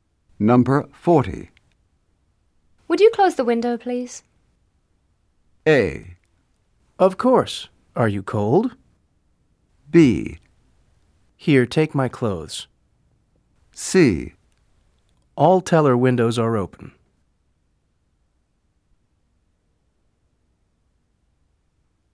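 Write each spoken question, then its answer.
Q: Would you close the window, please?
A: A: Of course. Are you cold?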